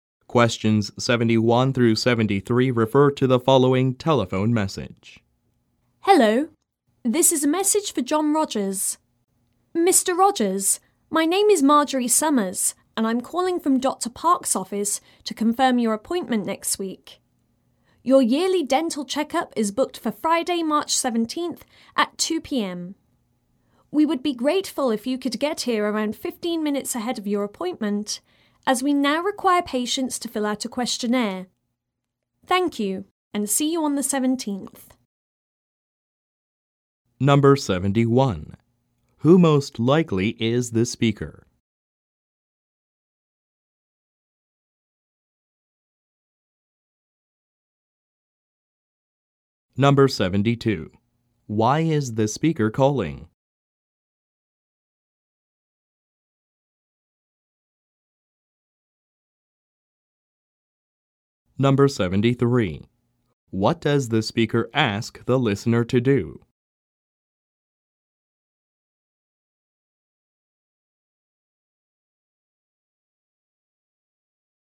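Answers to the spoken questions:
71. A worker at a dentist's office (Dr. Park's office)
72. To confirm an appointment
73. Arrive about 15 minutes early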